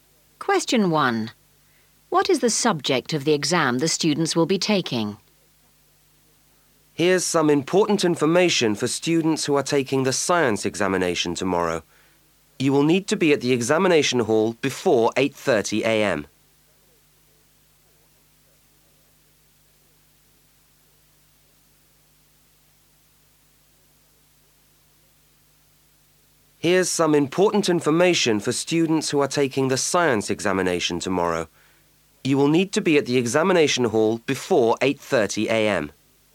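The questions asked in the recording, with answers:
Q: What is the subject of the exam the students will be taking?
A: Science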